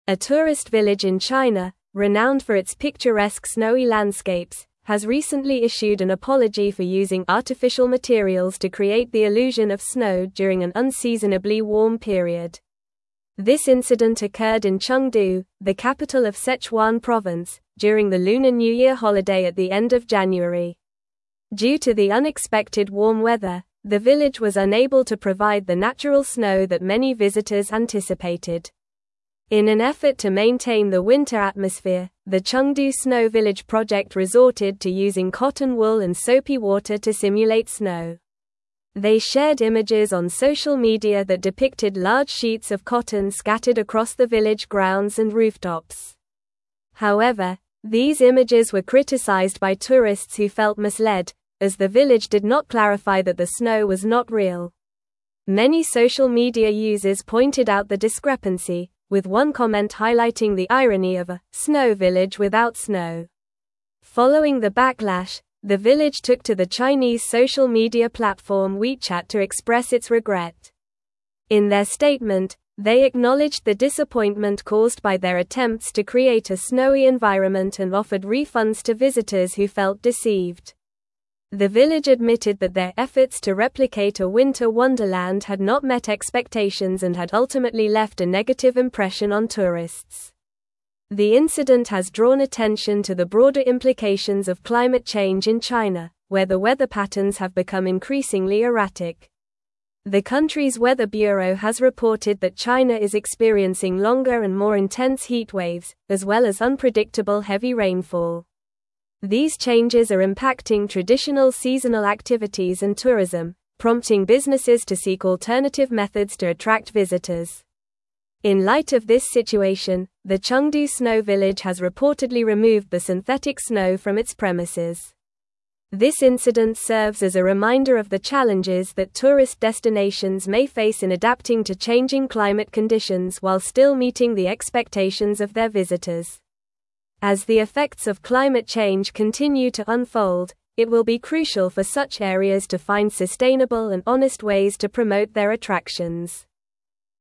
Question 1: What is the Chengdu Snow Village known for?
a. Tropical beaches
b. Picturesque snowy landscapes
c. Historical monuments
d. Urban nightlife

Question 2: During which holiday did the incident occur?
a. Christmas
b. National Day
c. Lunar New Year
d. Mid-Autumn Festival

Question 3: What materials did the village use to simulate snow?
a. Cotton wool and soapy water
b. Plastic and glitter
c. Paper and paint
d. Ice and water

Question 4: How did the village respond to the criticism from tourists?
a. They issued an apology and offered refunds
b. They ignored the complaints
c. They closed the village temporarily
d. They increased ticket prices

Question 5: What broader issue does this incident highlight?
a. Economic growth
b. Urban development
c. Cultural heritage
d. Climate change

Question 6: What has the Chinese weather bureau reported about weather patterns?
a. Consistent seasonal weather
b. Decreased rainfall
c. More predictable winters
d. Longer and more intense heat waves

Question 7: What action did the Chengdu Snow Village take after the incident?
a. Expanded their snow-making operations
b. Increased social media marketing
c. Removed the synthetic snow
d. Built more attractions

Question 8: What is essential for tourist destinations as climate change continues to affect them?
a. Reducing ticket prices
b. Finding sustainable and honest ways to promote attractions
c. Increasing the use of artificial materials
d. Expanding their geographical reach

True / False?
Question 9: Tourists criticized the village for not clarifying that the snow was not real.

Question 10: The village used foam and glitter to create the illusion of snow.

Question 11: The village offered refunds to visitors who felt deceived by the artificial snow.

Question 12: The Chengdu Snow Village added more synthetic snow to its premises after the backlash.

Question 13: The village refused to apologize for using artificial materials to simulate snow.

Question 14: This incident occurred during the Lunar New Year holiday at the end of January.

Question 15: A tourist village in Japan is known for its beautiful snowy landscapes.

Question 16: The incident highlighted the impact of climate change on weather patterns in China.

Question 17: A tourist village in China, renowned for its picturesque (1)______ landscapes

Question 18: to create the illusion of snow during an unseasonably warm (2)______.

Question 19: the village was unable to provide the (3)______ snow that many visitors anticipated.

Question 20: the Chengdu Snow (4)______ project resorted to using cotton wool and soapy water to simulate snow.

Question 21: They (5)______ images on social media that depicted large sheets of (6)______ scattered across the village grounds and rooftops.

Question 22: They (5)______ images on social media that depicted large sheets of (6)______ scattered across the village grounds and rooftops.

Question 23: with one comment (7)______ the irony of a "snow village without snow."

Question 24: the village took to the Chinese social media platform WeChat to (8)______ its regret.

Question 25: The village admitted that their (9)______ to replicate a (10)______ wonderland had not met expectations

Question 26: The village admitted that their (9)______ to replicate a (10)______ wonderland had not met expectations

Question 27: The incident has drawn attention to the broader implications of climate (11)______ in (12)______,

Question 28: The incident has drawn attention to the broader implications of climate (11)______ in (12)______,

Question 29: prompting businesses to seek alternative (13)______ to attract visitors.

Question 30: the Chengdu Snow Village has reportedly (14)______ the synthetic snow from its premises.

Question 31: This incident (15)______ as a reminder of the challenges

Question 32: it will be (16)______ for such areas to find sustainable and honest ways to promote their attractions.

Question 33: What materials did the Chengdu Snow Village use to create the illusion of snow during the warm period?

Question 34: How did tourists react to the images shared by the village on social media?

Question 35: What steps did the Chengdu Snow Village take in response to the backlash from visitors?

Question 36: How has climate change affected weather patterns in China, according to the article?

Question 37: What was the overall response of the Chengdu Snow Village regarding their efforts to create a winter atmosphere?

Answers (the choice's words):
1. Picturesque snowy landscapes
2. Lunar New Year
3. Cotton wool and soapy water
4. They issued an apology and offered refunds
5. Climate change
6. Longer and more intense heat waves
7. Removed the synthetic snow
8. Finding sustainable and honest ways to promote attractions
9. True
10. False
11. True
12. False
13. False
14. True
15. False
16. True
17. snowy
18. period
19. natural
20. Village
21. shared
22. cotton
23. highlighting
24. express
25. efforts
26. winter
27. change
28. China
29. methods
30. removed
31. serves
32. crucial
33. The Chengdu Snow Village used cotton wool and soapy water to simulate snow.
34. Tourists felt misled and criticized the village for not clarifying that the snow was not real, with some commenting on the irony of a "snow village without snow."
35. The village expressed regret on WeChat, acknowledged the disappointment caused, and offered refunds to visitors who felt deceived.
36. Climate change has led to longer and more intense heat waves, as well as unpredictable heavy rainfall in China.
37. The Chengdu Snow Village admitted that their efforts had not met expectations and left a negative impression on tourists.

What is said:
A tourist village in China, renowned for its picturesque snowy landscapes, has recently issued an apology for using artificial materials to create the illusion of snow during an unseasonably warm period. This incident occurred in Chengdu, the capital of Sichuan province, during the Lunar New Year holiday at the end of January. Due to the unexpected warm weather, the village was unable to provide the natural snow that many visitors anticipated.
In an effort to maintain the winter atmosphere, the Chengdu Snow Village project resorted to using cotton wool and soapy water to simulate snow. They shared images on social media that depicted large sheets of cotton scattered across the village grounds and rooftops. However, these images were criticized by tourists who felt misled, as the village did not clarify that the snow was not real. Many social media users pointed out the discrepancy, with one comment highlighting the irony of a "snow village without snow."
Following the backlash, the village took to the Chinese social media platform WeChat to express its regret. In their statement, they acknowledged the disappointment caused by their attempts to create a snowy environment and offered refunds to visitors who felt deceived. The village admitted that their efforts to replicate a winter wonderland had not met expectations and had ultimately left a negative impression on tourists.
The incident has drawn attention to the broader implications of climate change in China, where the weather patterns have become increasingly erratic. The country's weather bureau has reported that China is experiencing longer and more intense heat waves, as well as unpredictable heavy rainfall. These changes are impacting traditional seasonal activities and tourism, prompting businesses to seek alternative methods to attract visitors.
In light of this situation, the Chengdu Snow Village has reportedly removed the synthetic snow from its premises. This incident serves as a reminder of the challenges that tourist destinations may face in adapting to changing climate conditions while still meeting the expectations of their visitors. As the effects of climate change continue to unfold, it will be crucial for such areas to find sustainable and honest ways to promote their attractions.

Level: Level 4